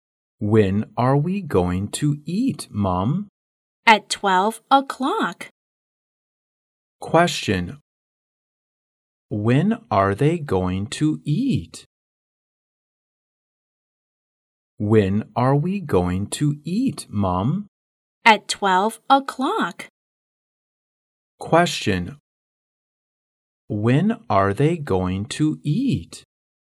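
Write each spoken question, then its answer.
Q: When are they going to eat?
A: At 12 o'clock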